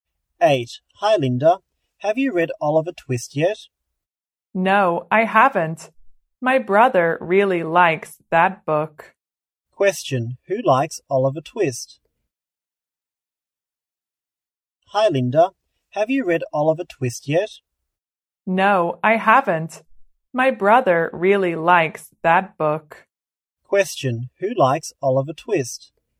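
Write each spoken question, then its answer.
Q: Who likes Oliver Twist?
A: Linda's brother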